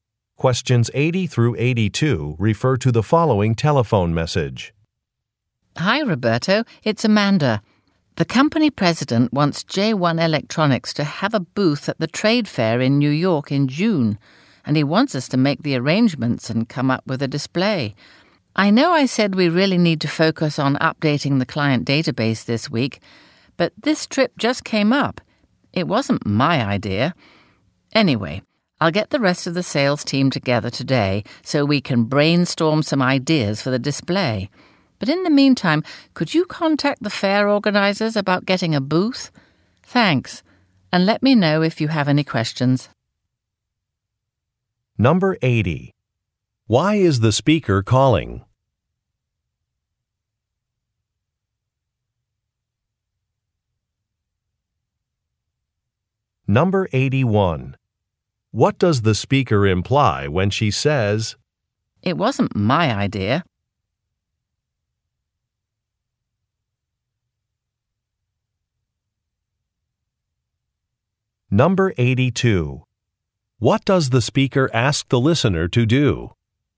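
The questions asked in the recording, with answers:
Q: Why is the speaker calling?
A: To ask for help preparing for a trade fair booth and display

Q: What does the speaker imply when she says,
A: The company president decided on the trip, not her

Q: What does the speaker ask the listener to do?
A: Contact the fair organizers about getting a booth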